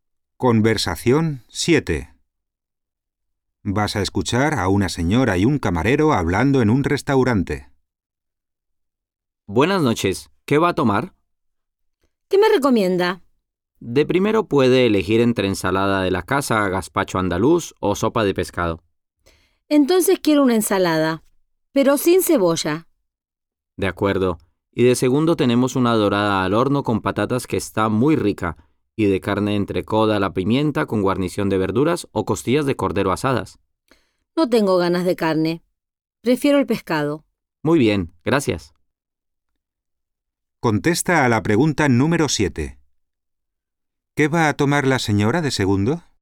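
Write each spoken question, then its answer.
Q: ¿Qué va a tomar la señora de segundo?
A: Dorada al horno con patatas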